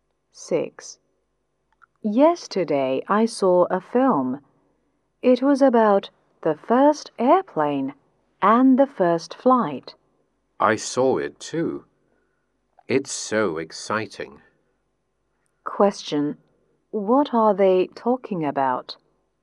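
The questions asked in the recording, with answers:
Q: What are they talking about?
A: A film about the first airplane and the first flight.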